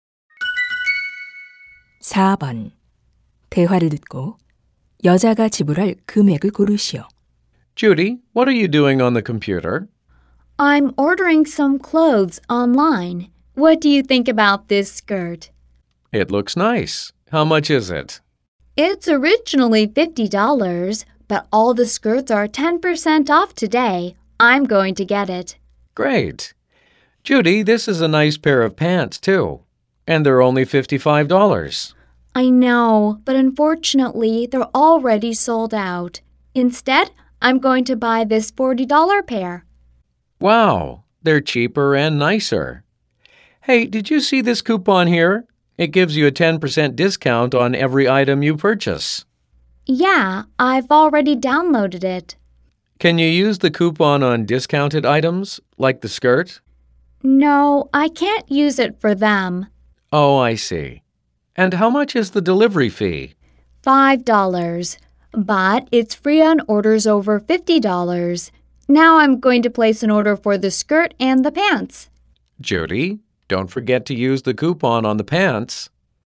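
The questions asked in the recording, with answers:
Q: 대화를 듣고 여자가 지불할 금액을 고르시오.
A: $81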